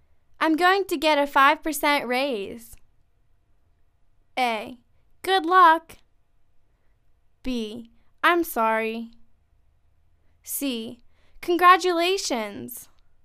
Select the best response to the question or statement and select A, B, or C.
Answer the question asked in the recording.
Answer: Congratulations!